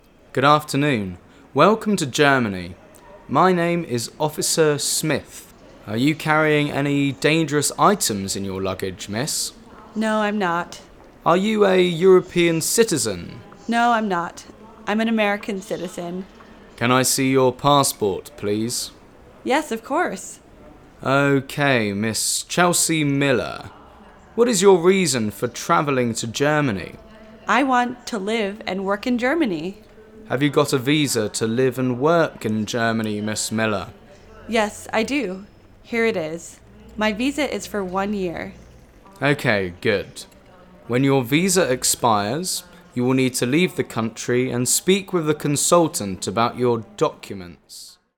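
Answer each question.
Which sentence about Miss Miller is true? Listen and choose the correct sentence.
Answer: She is an American citizen with a one-year visa to live and work in Germany.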